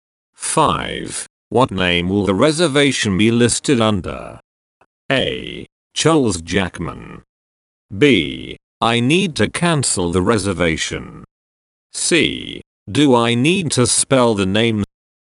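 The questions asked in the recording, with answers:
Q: What name will the reservation be listed under?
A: A: Charles Jackman.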